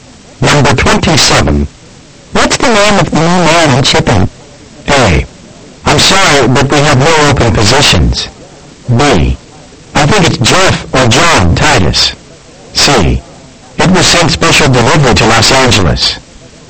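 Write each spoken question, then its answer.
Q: What's the name of the new man in shipping?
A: B: I think it's Jeff or John Titus.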